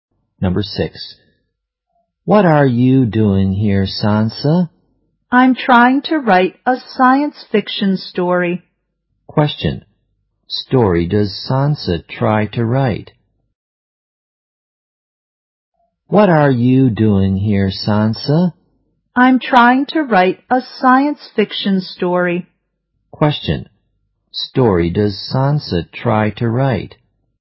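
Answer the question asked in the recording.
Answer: A science fiction story.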